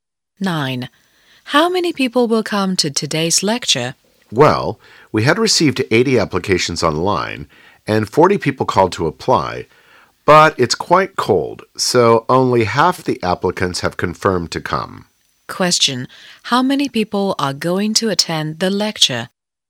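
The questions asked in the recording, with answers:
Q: How many people are going to attend the lecture?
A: 60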